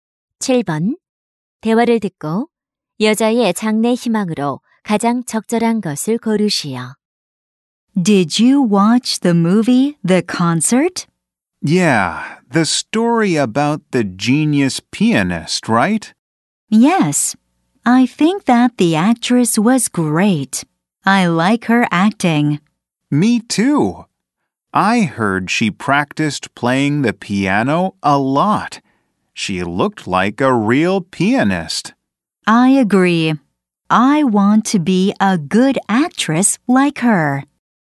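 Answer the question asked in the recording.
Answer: 배우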